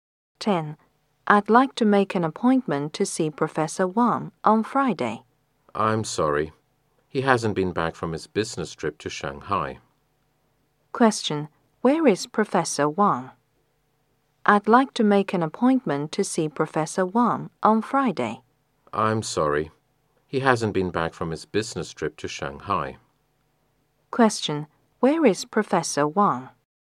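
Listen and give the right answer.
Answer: On a business trip in Shanghai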